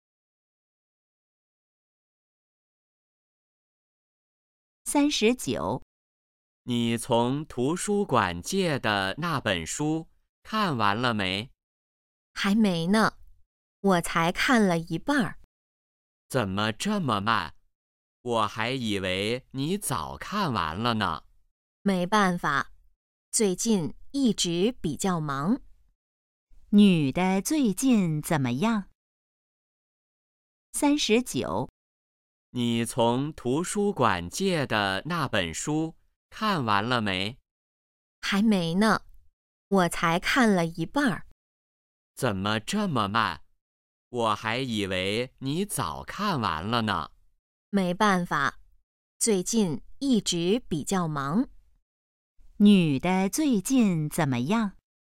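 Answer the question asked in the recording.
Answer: 比较忙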